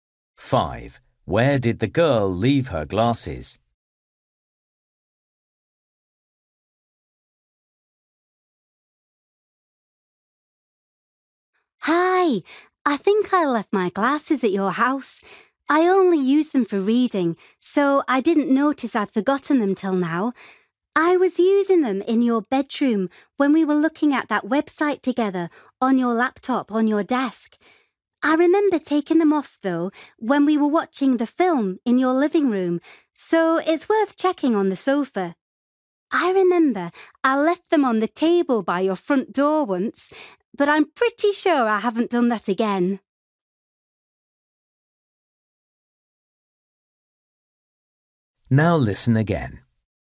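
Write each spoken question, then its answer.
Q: Where did the girl leave her glasses?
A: On the sofa in the living room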